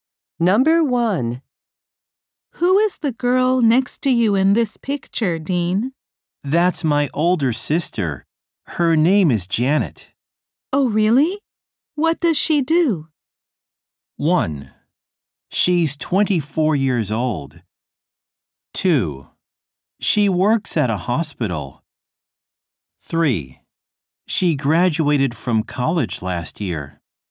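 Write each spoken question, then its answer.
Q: Oh, really? What does she do?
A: 2: She works at a hospital.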